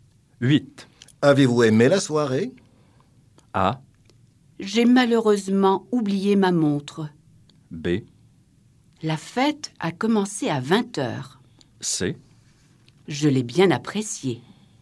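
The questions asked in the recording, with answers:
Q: Avez-vous aimé la soirée?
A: C: Je l'ai bien apprécié.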